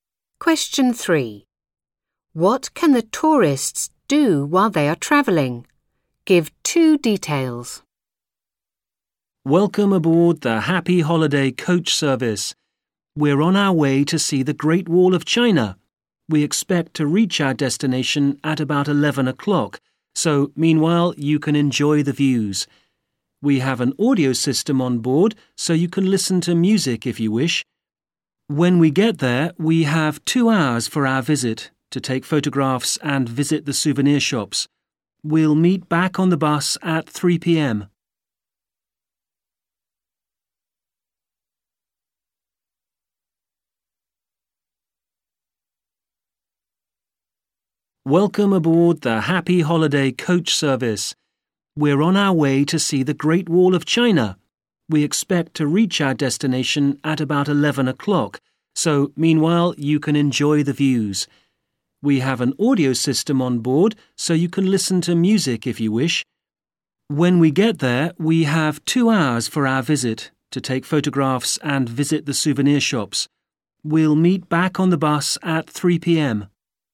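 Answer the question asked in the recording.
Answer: Enjoy the views and listen to music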